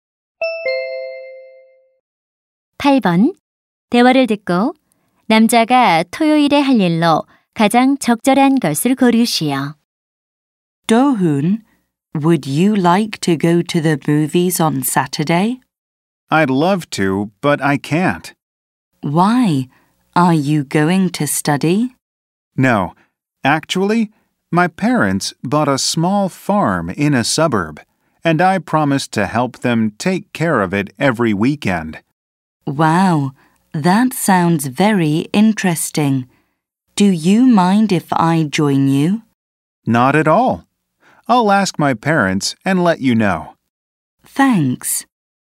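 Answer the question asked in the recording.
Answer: 부모님의 농장 일 돕기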